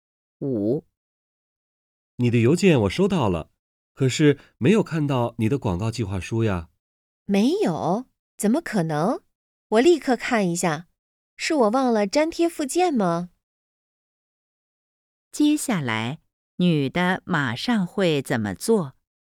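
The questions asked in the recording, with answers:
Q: 接下来,女的马上会怎么做?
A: 检查邮件,看是否忘了粘贴附件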